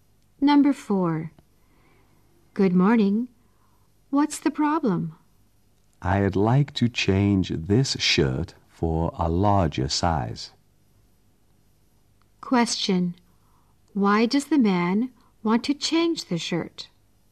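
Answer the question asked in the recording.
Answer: He needs a larger size.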